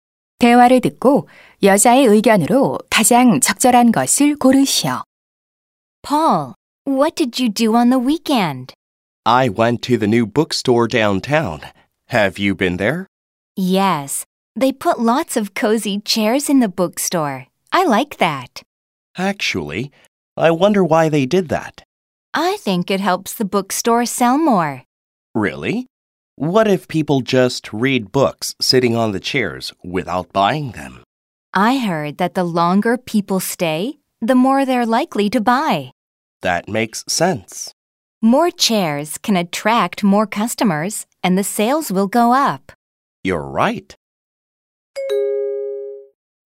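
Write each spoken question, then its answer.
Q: 대화를 듣고 여자의 의견으로 가장 적절한 것을 고르시오.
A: 서점에 편안한 의자를 두면 판매가 늘어난다.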